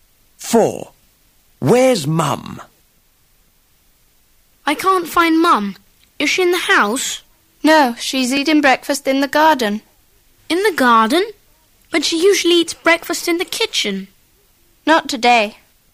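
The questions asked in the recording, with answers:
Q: Where's Mum?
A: In the garden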